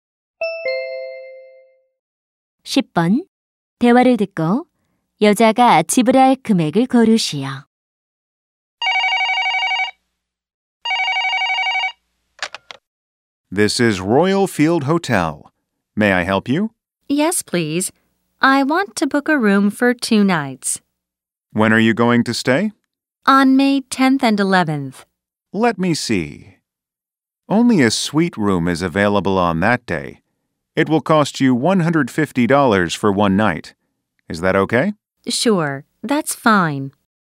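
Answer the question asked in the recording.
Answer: 300달러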